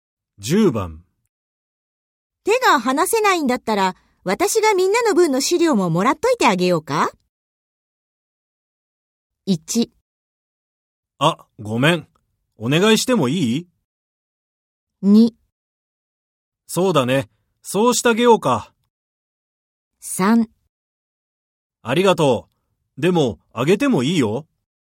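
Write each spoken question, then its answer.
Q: 手が離せないんだったら、私がみんなの分の資料ももらっといてあげようか?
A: 1: あ、ごめん。お願いしてもいい?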